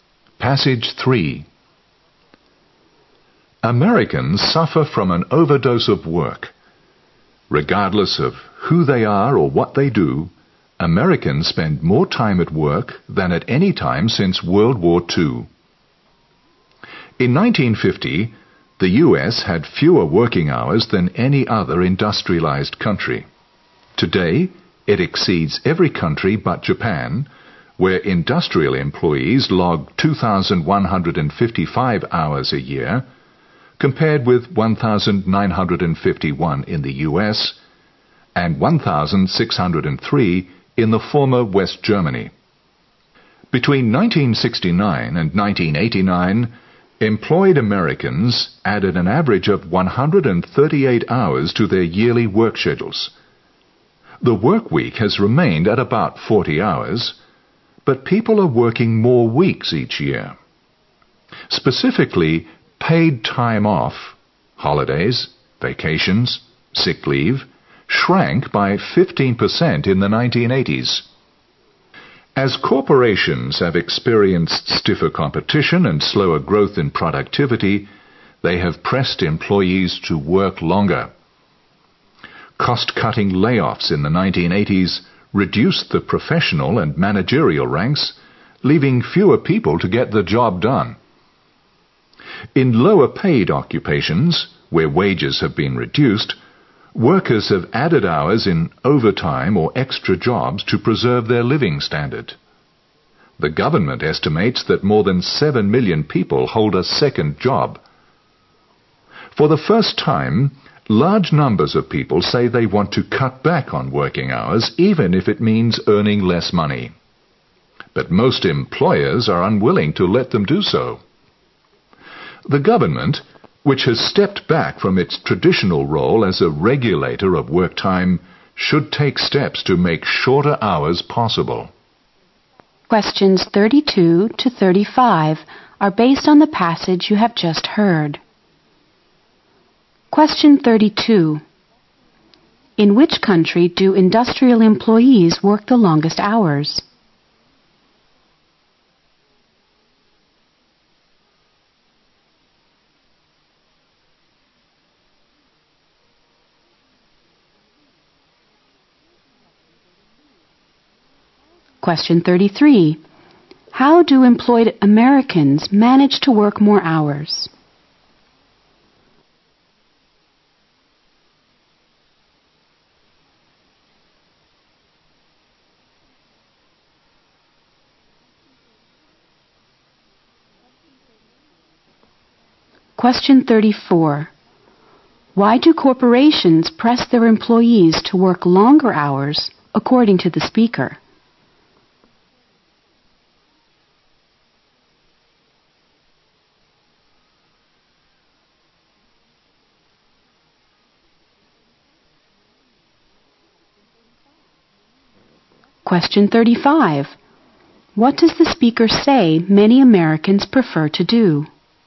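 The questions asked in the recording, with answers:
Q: In which country do industrial employees work the longest hours?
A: Japan

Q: How do employed Americans manage to work more hours?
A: By working more weeks a year, with less paid time off

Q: Why do corporations press their employees to work longer hours, according to the speaker?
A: Because of stiffer competition and slower productivity growth

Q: What does the speaker say many Americans prefer to do?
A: Work shorter hours even if they earn less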